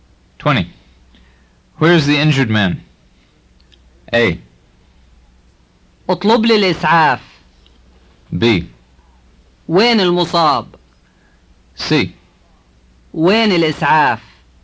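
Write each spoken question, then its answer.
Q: Where is the injured man?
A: B: وين المصاب؟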